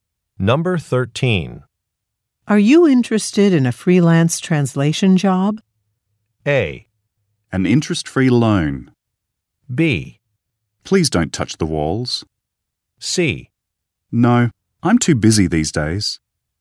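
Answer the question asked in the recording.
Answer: C: No, I'm too busy these days.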